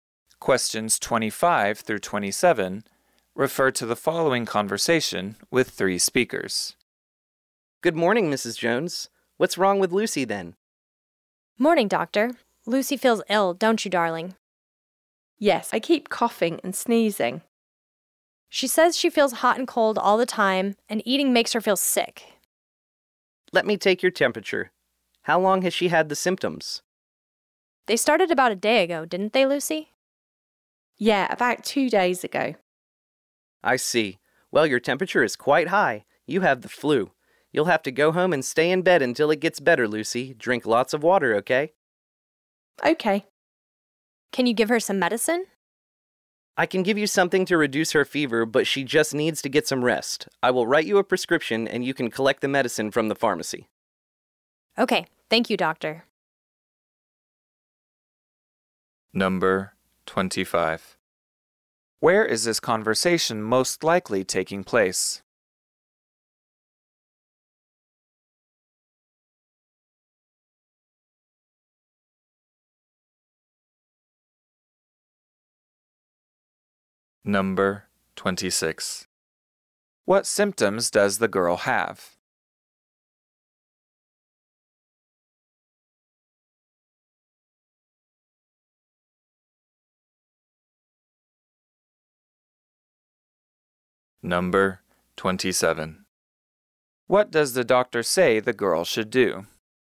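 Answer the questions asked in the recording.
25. At a doctor's office
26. Coughing, sneezing, feeling hot and cold, and feeling sick when eating
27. Go home, stay in bed and drink lots of water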